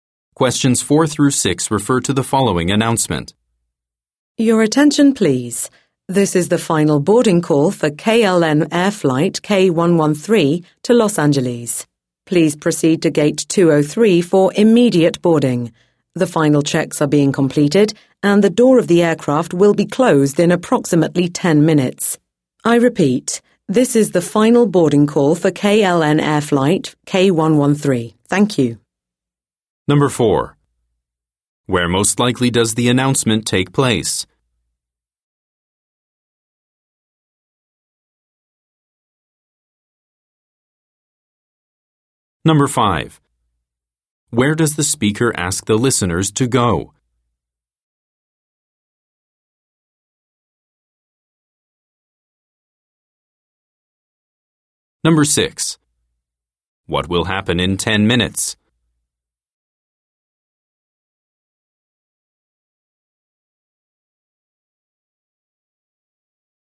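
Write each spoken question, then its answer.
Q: Where most likely does the announcement take place?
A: At an airport

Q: Where does the speaker ask the listeners to go?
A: To gate 203

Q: What will happen in 10 minutes?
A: The aircraft door will be closed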